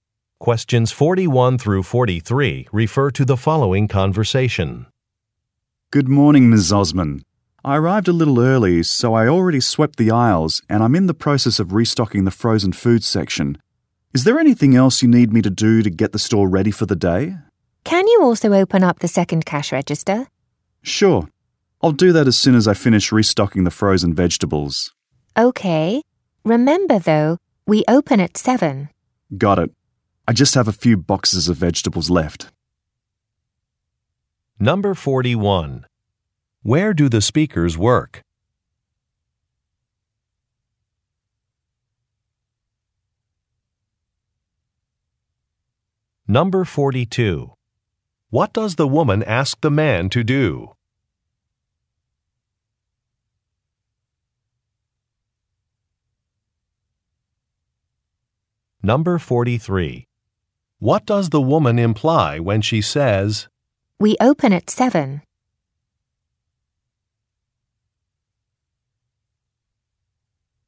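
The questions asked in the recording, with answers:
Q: Where do the speakers work?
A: At a grocery store

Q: What does the woman ask the man to do?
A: Open the second cash register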